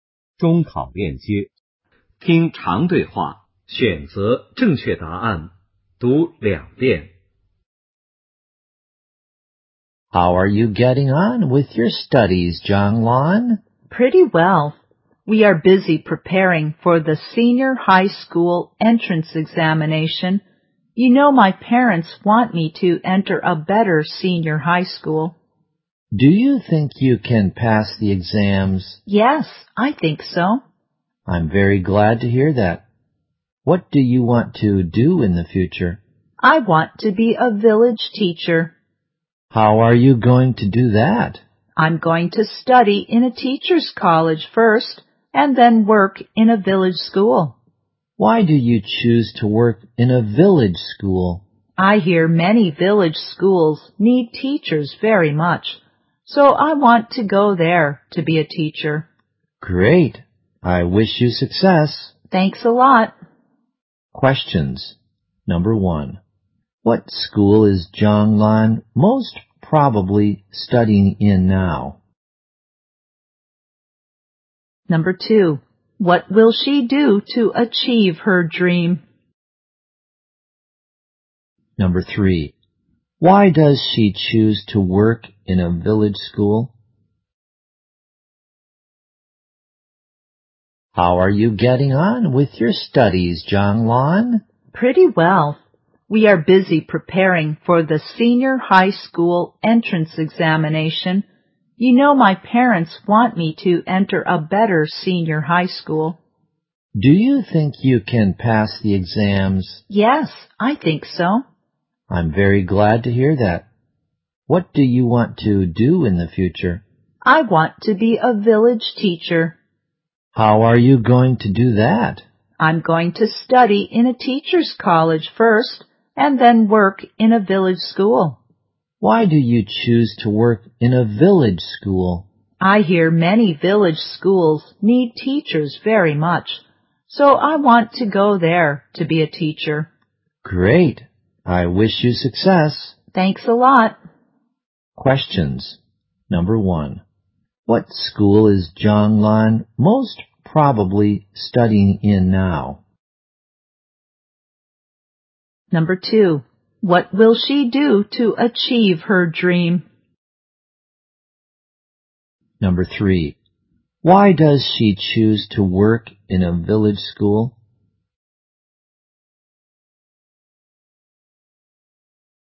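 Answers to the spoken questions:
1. A junior high school.
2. Study in a teachers' college first.
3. Many village schools need teachers very much.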